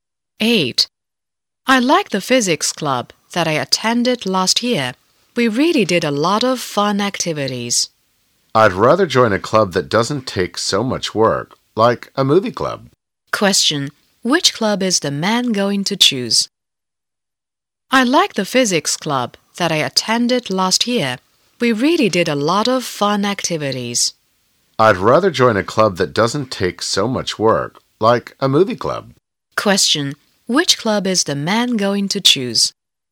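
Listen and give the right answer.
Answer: A movie club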